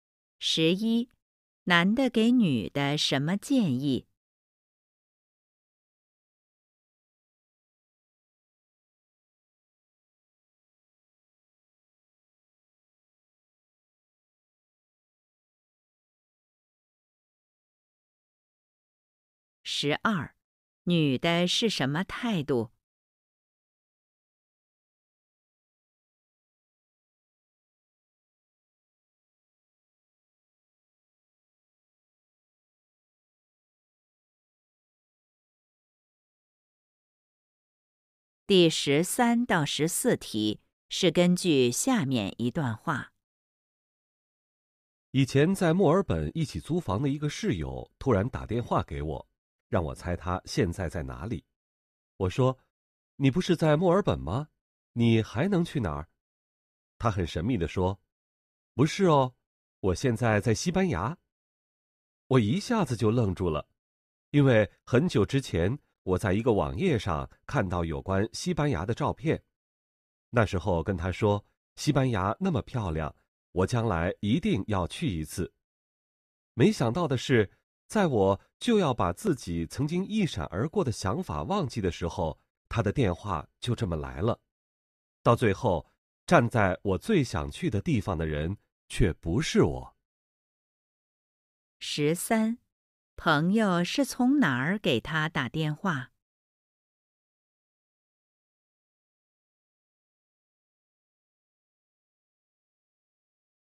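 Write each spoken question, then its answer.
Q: 朋友是从哪儿给他打电话?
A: 西班牙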